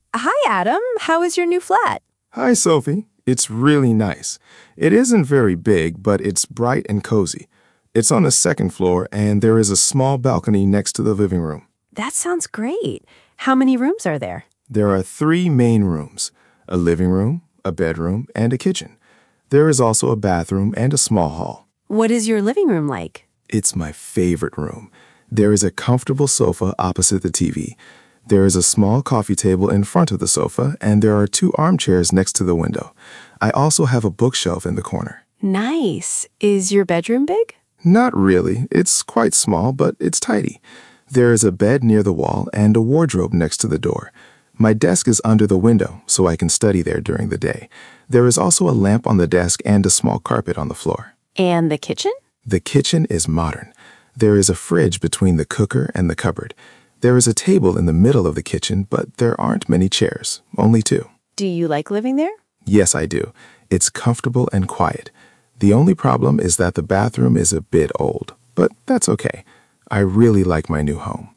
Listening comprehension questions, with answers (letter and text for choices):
Uzupełnij zdania właściwym przyimkiem miejsca:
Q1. There is a coffee table ______ the sofa.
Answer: in front of

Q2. There are two armchairs ______ the window.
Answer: next to

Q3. The bookshelf is ______ the corner.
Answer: in

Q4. The desk is ______ the window.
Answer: under

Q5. The fridge is ______ the cooker and the cupboard.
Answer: between

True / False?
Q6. Adam's flat is very big.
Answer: False

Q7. The balcony is next to the living room.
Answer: True

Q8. There is a sofa opposite the TV.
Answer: True

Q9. Adam's bedroom is large and messy.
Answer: False

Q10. His desk is under the window.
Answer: True

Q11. There are many chairs in the kitchen.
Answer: False

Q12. Adam says the bathroom is a bit old.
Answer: True

Przeczytaj pytania, a potem posłuchaj i wybierz właściwą odpowiedź.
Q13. What are Sophie and Adam talking about?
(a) Adam's school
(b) Adam's new flat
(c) Adam's holiday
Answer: (b) Adam's new flat

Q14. What is Adam's opinion about the flat?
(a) He doesn't like it.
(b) He thinks it is too big.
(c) He likes it because it is comfortable and quiet.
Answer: (c) He likes it because it is comfortable and quiet.

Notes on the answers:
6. it isn't very big, but it's bright and cosy.
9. it's quite small but tidy.
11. there are only two chairs.

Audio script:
Sophie: Hi, Adam! How is your new flat?
Adam: Hi, Sophie. It's really nice. It isn't very big, but it's bright and cosy. It's on the second floor, and there is a small balcony next to the living room.
Sophie: That sounds great. How many rooms are there?
Adam: There are three main rooms: a living room, a bedroom and a kitchen. There is also a bathroom and a small hall.
Sophie: What is your living room like?
Adam: It's my favourite room. There is a comfortable sofa opposite the TV. There is a small coffee table in front of the sofa, and there are two armchairs next to the window. I also have a bookshelf in the corner.
Sophie: Nice. Is your bedroom big?
Adam: Not really. It's quite small, but it's tidy. There is a bed near the wall and a wardrobe next to the door. My desk is under the window, so I can study there during the day. There is also a lamp on the desk and a small carpet on the floor.
Sophie: And the kitchen?
Adam: The kitchen is modern. There is a fridge between the cooker and the cupboard. There is a table in the middle of the kitchen, but there aren't many chairs — only two.
Sophie: Do you like living there?
Adam: Yes, I do. It's comfortable and quiet. The only problem is that the bathroom is a bit old, but that's okay. I really like my new home.

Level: A2+/B1